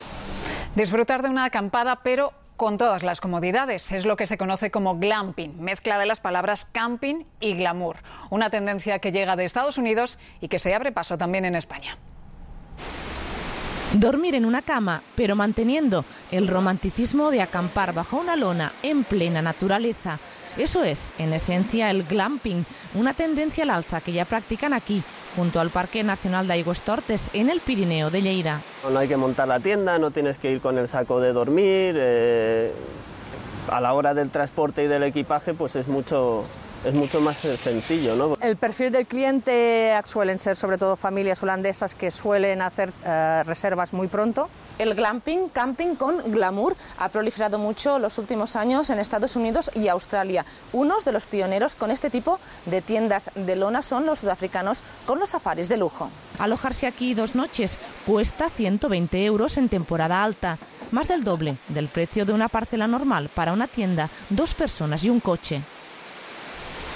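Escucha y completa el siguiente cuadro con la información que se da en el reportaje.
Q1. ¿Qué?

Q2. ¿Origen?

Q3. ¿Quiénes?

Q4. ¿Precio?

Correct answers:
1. Glamping: acampada con todas las comodidades (camping y glamour)
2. Estados Unidos
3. Sobre todo familias holandesas
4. 120 euros dos noches en temporada alta

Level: 中高级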